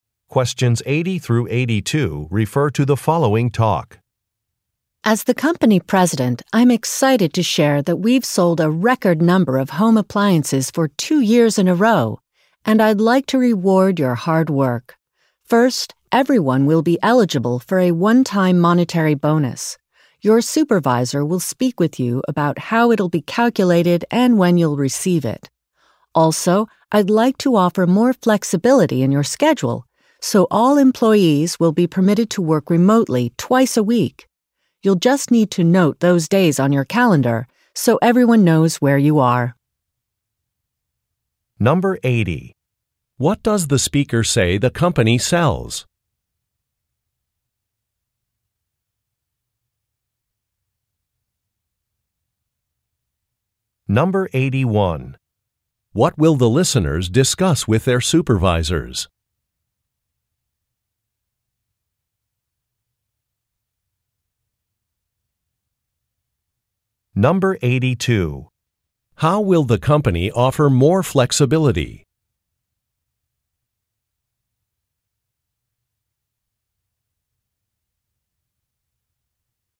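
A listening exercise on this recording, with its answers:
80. What does the speaker say the company sells?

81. What will the listeners discuss with their supervisors?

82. How will the company offer more flexibility?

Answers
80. Home appliances
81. A one-time bonus
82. By letting employees work remotely twice a week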